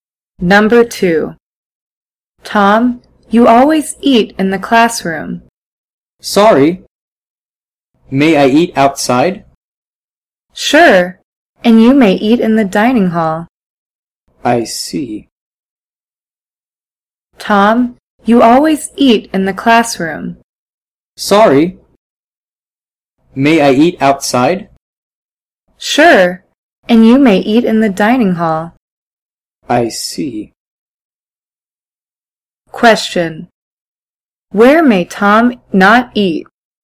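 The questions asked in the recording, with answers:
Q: Where may Tom not eat?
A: In the classroom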